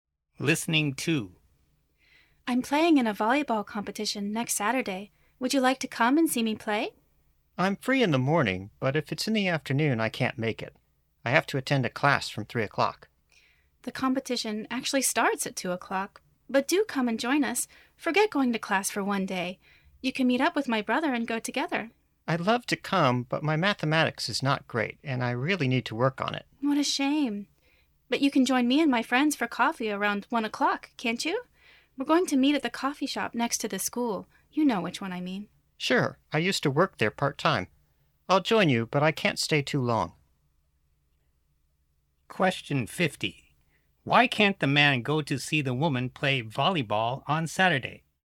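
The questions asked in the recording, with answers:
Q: Why can't the man go to see the woman play volleyball on Saturday?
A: He has to attend a (mathematics) class from 3 o'clock.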